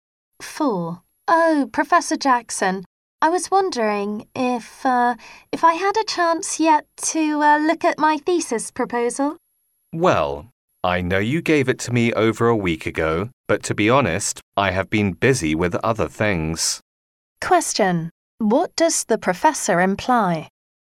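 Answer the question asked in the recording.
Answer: He hasn't read the thesis proposal yet.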